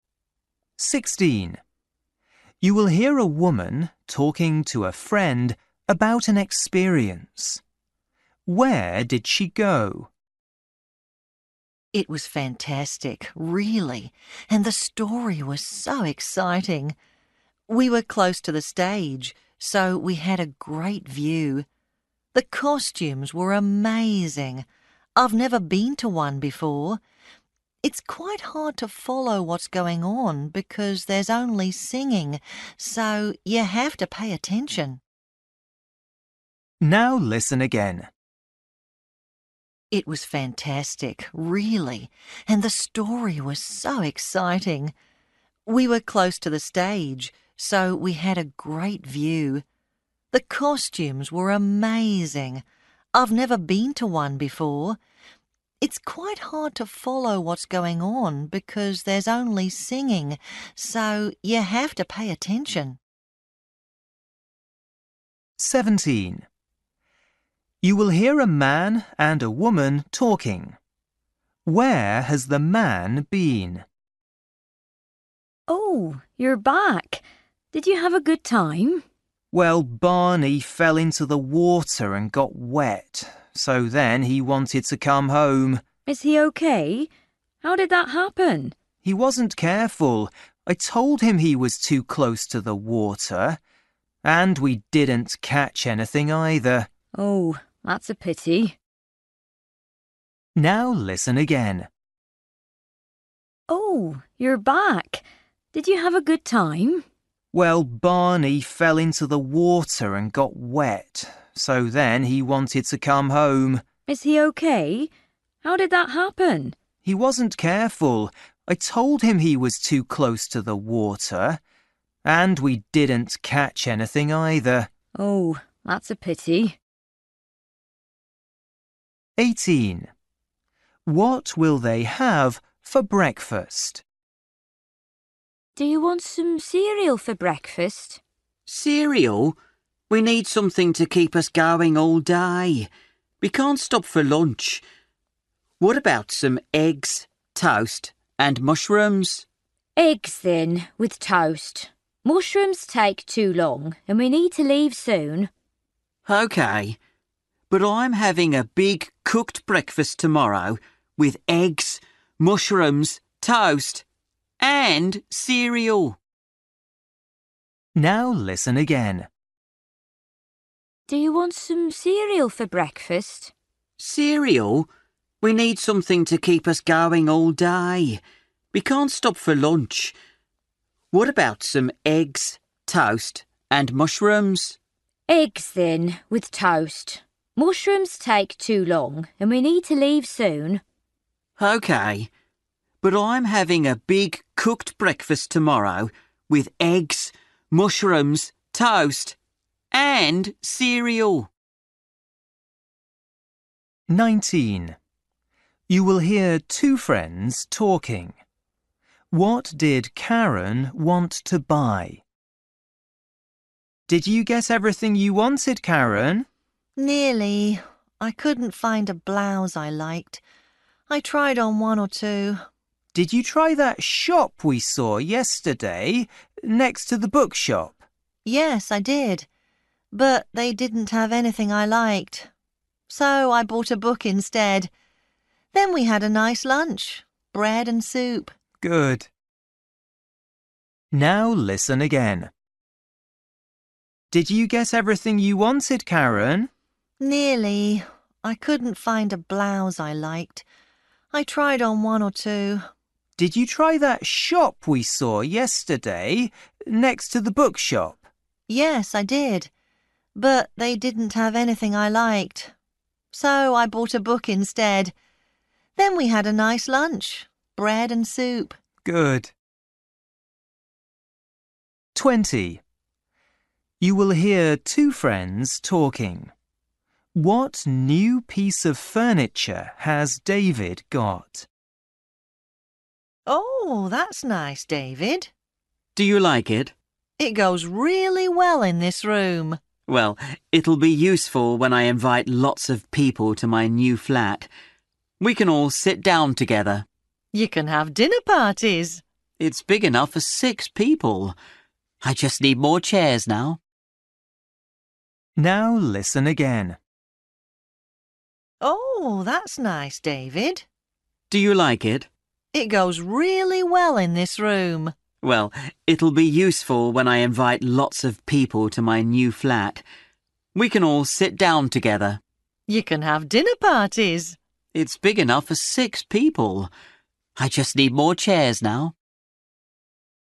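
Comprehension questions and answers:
For each question, choose the correct answer.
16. You will hear a woman talking to a friend about an experience. Where did she go?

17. You will hear a man and a woman talking. Where has the man been?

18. What will they have for breakfast?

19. You will hear two friends talking. What did Karen want to buy?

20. You will hear two friends talking. What new piece of furniture has David got?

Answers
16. the opera
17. fishing by the water
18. eggs with toast
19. a blouse
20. a table

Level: Luyện nghe trình độ A2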